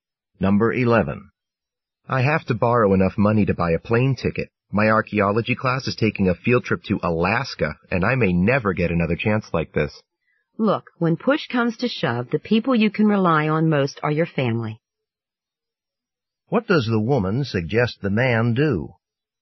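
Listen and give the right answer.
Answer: Borrow the money from his family.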